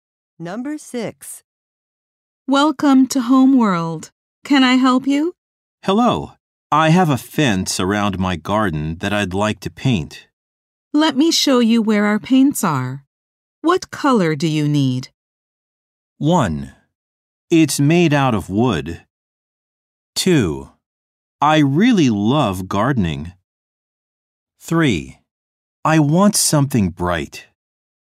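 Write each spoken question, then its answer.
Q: What color do you need?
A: 3: I want something bright.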